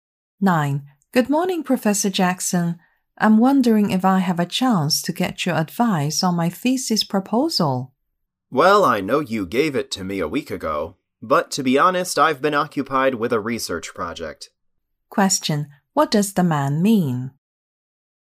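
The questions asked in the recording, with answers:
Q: What does the man mean?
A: He hasn't read her thesis proposal yet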